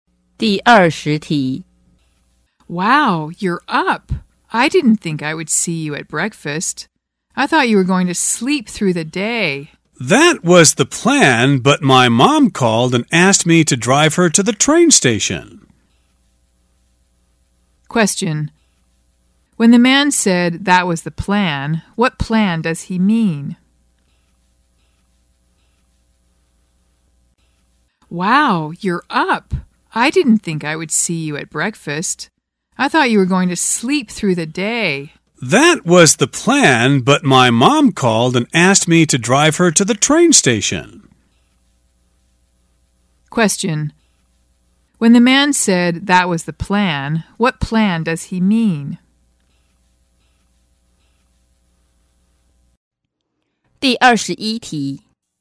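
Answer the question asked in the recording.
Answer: To sleep through the day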